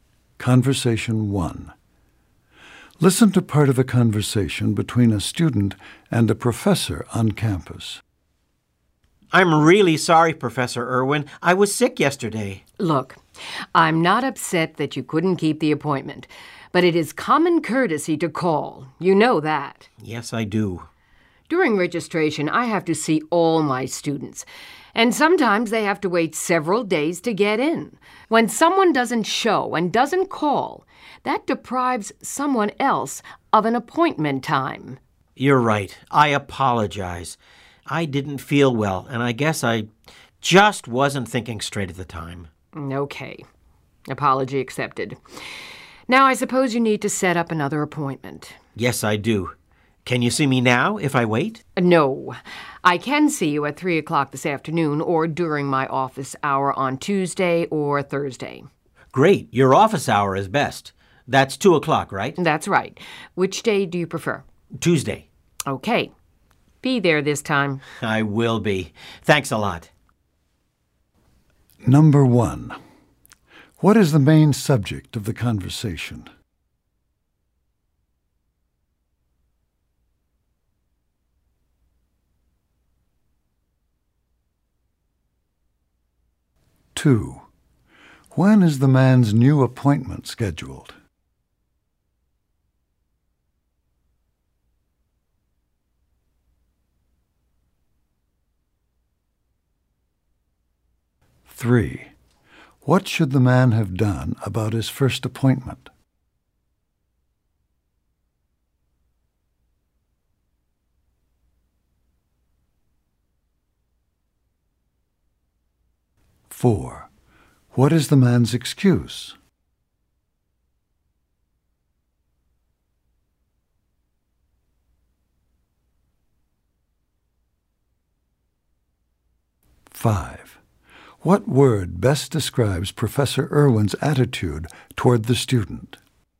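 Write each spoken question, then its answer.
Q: What is the main subject of the conversation?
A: Rescheduling a missed appointment

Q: When is the man's new appointment scheduled?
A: Tuesday at 2 o'clock

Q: What should the man have done about his first appointment?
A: Called the professor

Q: What is the man's excuse?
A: He was sick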